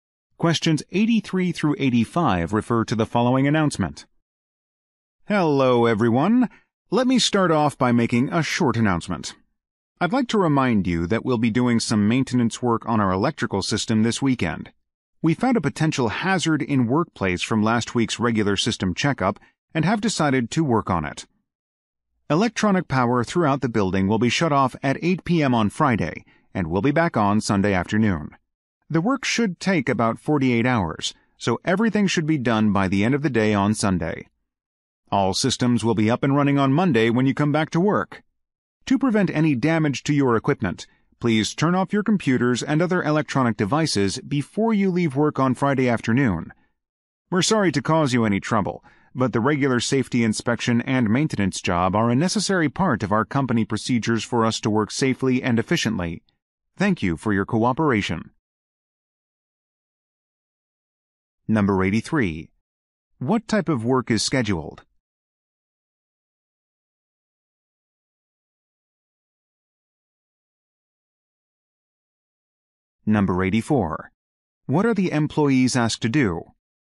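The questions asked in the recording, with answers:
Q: What type of work is scheduled?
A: Maintenance work on the electrical system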